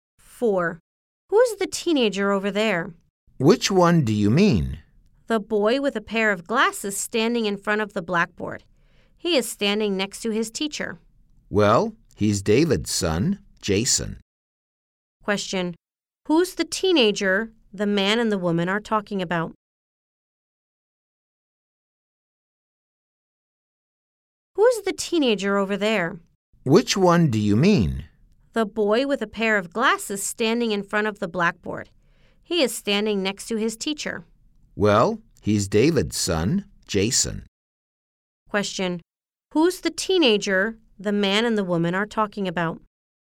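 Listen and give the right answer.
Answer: Jason, David's son.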